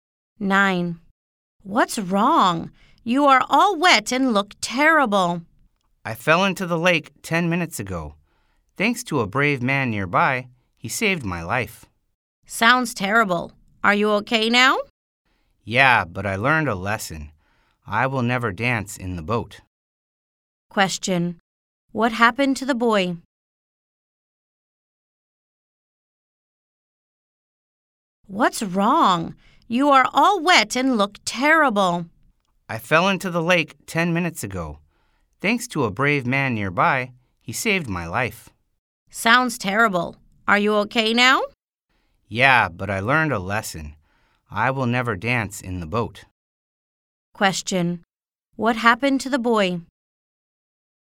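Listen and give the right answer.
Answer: He fell into the lake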